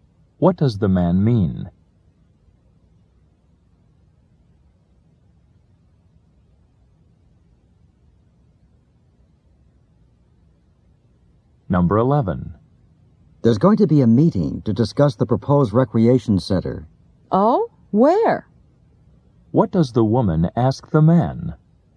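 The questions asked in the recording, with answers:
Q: What does the woman ask the man?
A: Where the meeting will be held.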